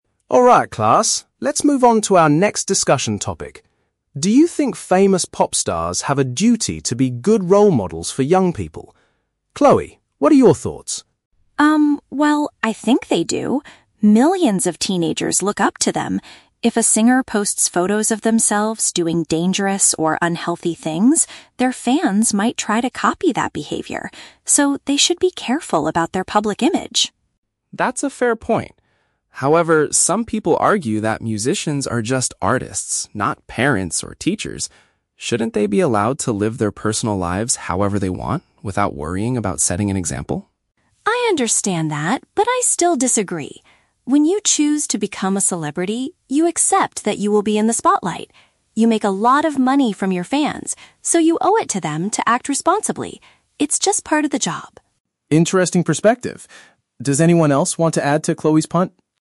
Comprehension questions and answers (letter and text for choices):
Listen to a classroom discussion between a teacher and a student. Choose the correct answer (A, B, or C) for each question.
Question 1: Why does Chloe believe pop stars need to be careful about their actions?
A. Because teenagers might imitate their bad habits.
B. Because they might lose their advertising contracts.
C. Because parents and teachers will criticize their music.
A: A. Because teenagers might imitate their bad habits.

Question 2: What opposing view does Mr. Harris mention?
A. Singers do not earn enough money to act as role models.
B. Musicians should have the freedom to live without worrying about their public image.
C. Artists should only focus on writing positive and educational songs.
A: B. Musicians should have the freedom to live without worrying about their public image.

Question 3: How does Chloe view the relationship between fame and responsibility?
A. She thinks celebrities should hide their mistakes from the media.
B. She feels that artists should not make a profit from young fans.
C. She believes being a good influence is a required part of being a public figure.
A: C. She believes being a good influence is a required part of being a public figure.

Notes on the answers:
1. Chloe states that if a singer does unhealthy things, "their fans might try to copy that behavior" (which is a paraphrase for "teenagers might imitate their bad habits"). Why the traps are wrong: (C) is a trap. The words "parents" and "teachers" are used by Mr. Harris later, but not in the context of criticizing music. (B) is a plausible real-world consequence, but advertising contracts are never mentioned in the audio.
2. Mr. Harris mentions the argument that artists should "be allowed to live their personal lives however they want, without worrying about setting an example" (which paraphrases to having the freedom to live without worrying about their public image). Why the traps are wrong: (A) is a trap. Money is mentioned later by Chloe ("make a lot of money"), but Mr. Harris doesn't say they don't earn enough. (C) is a trap. Mr. Harris says they are just artists, not that they should write educational songs.
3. Chloe argues that when celebrities are in the spotlight and make money from fans, they "owe it to them to act responsibly. It's just part of the job." This means being a good influence is a required part of their position. Why the traps are wrong: (A) is a trap. She wants them to act responsibly, not just hide bad behavior. (B) is a trap. She acknowledges that they do make money from fans, and uses that as a reason why they have a responsibility; she doesn't say they shouldn't make a profit.

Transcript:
Harris: Alright class, let's move on to our next discussion topic. Do you think famous pop stars have a duty to be good role models for young people? Chloe, what are your thoughts?
Chloe: Um, well, I think they do. Millions of teenagers look up to them. If a singer posts photos of themselves doing dangerous or unhealthy things, their fans might try to copy that behavior. So, they should be careful about their public image.
Harris: That's a fair point. However, some people argue that musicians are just artists, not parents or teachers. Shouldn't they be allowed to live their personal lives however they want, without worrying about setting an example?
Chloe: I understand that, but I still disagree. When you choose to become a celebrity, you accept that you will be in the spotlight. You make a lot of money from your fans, so you owe it to them to act responsibly. It's just part of the job.